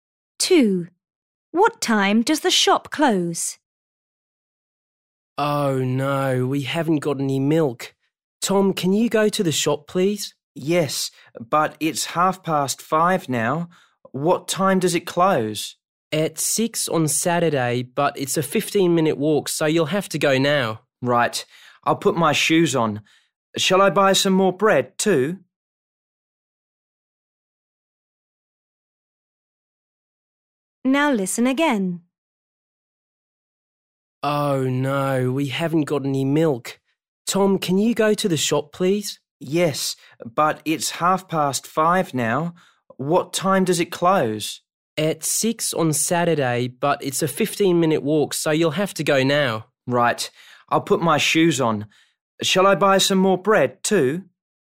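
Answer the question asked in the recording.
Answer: At 6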